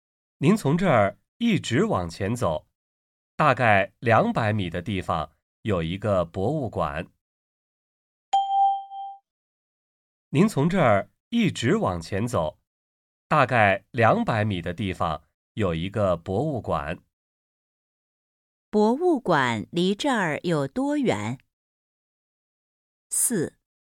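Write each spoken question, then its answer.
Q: 博物馆离这儿有多远?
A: 大概200米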